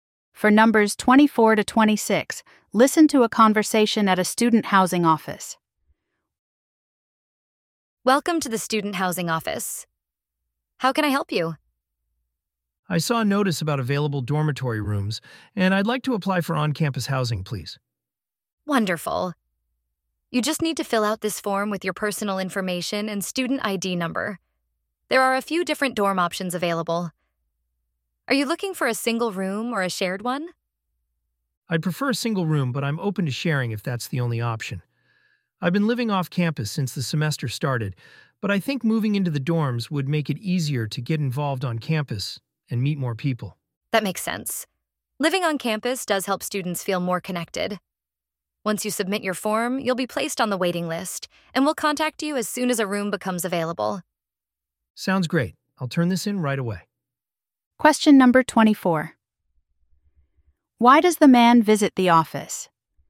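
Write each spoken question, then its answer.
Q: Why does the man visit the office?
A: To apply for on-campus housing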